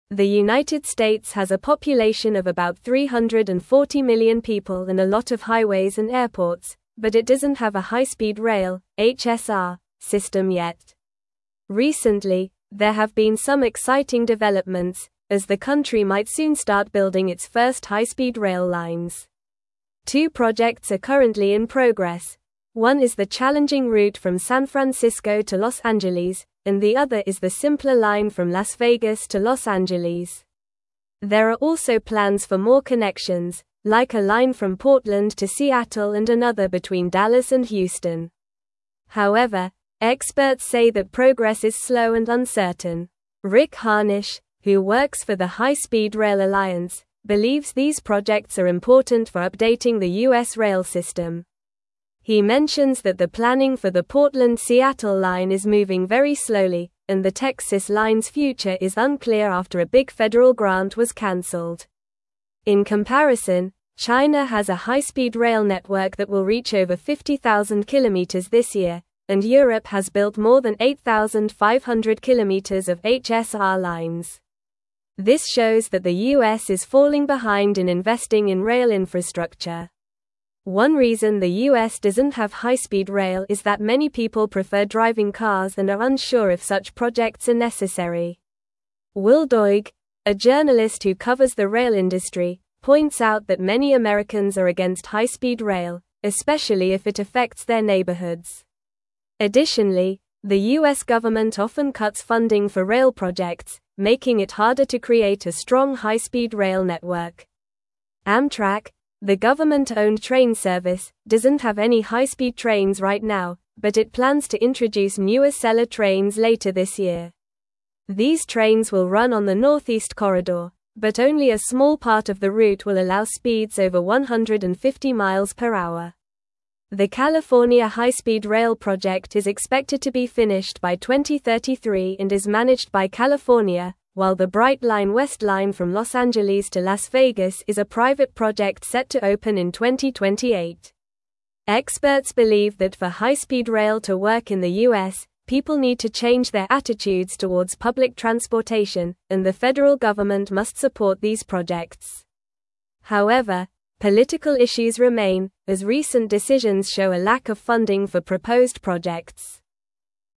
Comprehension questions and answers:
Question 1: The United States has a population of about 340 million people and a lot of highways and airports, but it doesn't have a high-speed rail (HSR) (1)______ yet.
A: system

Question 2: Recently, there have been some exciting developments, as the country might soon start building its (2)______ high-speed rail lines.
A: first

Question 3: There are also plans for more connections, like a line from (3)______ to Seattle and another between Dallas and (4)______.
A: Portland

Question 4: There are also plans for more connections, like a line from (3)______ to Seattle and another between Dallas and (4)______.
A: Houston

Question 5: However, experts say that progress is slow and (5)______.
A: uncertain

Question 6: He mentions that the planning for the Portland-Seattle line is moving very slowly, and the Texas line's (6)______ is unclear after a big federal grant was canceled.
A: future

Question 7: In comparison, China has a high-speed rail network that will reach over 50,000 kilometers this year, and (7)______ has (8)______ more than 8,500 kilometers of HSR lines.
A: Europe

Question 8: In comparison, China has a high-speed rail network that will reach over 50,000 kilometers this year, and (7)______ has (8)______ more than 8,500 kilometers of HSR lines.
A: built

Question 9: One reason the U.S. doesn't have high-speed rail is that many people prefer driving cars and are unsure if such (9)______ are necessary.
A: projects

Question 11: Amtrak, the government-owned (10)______ service, doesn't have any high-speed trains right now, but it plans to (11)______ new (12)______ trains later this year.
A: introduce

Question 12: Amtrak, the government-owned (10)______ service, doesn't have any high-speed trains right now, but it plans to (11)______ new (12)______ trains later this year.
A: Acela

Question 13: These trains will run on the Northeast (13)______, but only a small part of the route will allow (14)______ over 150 mph.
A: Corridor

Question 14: These trains will run on the Northeast (13)______, but only a small part of the route will allow (14)______ over 150 mph.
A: speeds

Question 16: Experts believe that for high-speed rail to work in the U.S., people need to change their attitudes towards public (16)______, and the federal government must support these projects.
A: transportation

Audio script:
The United States has a population of about 340 million people and a lot of highways and airports, but it doesn't have a high-speed rail (HSR) system yet. Recently, there have been some exciting developments, as the country might soon start building its first high-speed rail lines. Two projects are currently in progress: one is the challenging route from San Francisco to Los Angeles, and the other is the simpler line from Las Vegas to Los Angeles. There are also plans for more connections, like a line from Portland to Seattle and another between Dallas and Houston. However, experts say that progress is slow and uncertain.
Rick Harnish, who works for the High Speed Rail Alliance, believes these projects are important for updating the U.S. rail system. He mentions that the planning for the Portland-Seattle line is moving very slowly, and the Texas line's future is unclear after a big federal grant was canceled. In comparison, China has a high-speed rail network that will reach over 50,000 kilometers this year, and Europe has built more than 8,500 kilometers of HSR lines. This shows that the U.S. is falling behind in investing in rail infrastructure.
doesn't have high-speed rail is that many people prefer driving cars and are unsure if such projects are necessary. Will Doig, a journalist who covers the rail industry, points out that many Americans are against high-speed rail, especially if it affects their neighborhoods. government often cuts funding for rail projects, making it harder to create a strong high-speed rail network.
Amtrak, the government-owned train service, doesn't have any high-speed trains right now, but it plans to introduce new Acela trains later this year. These trains will run on the Northeast Corridor, but only a small part of the route will allow speeds over 150 mph. The California High-Speed Rail project is expected to be finished by 2033 and is managed by California, while the Brightline West line from Los Angeles to Las Vegas is a private project set to open in 2028. Experts believe that for high-speed rail to work in the U.S., people need to change their attitudes towards public transportation, and the federal government must support these projects. However, political issues remain, as recent decisions show a lack of funding for proposed projects.

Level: Level 3